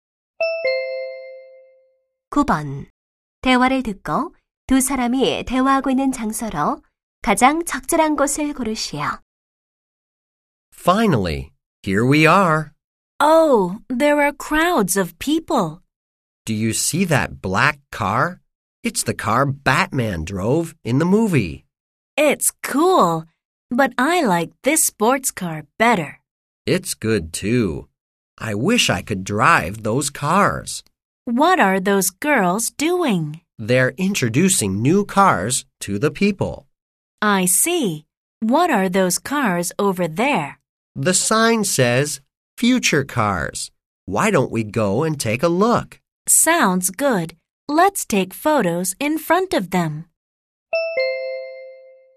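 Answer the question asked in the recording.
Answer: 자동차 전시회(모터쇼)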